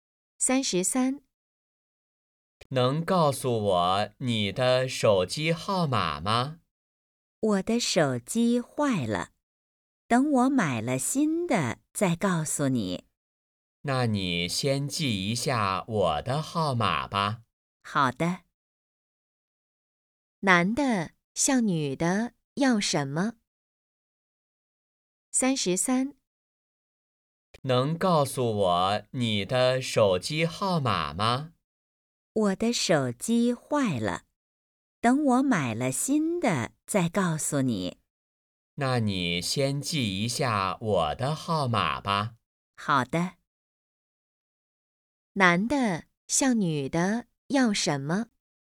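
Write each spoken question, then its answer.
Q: 男的向女的要什么?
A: 手机号码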